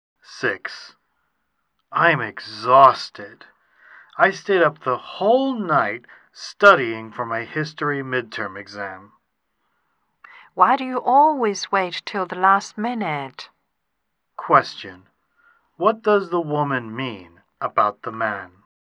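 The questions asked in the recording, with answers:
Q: What does the woman mean about the man?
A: He always puts things off until the last minute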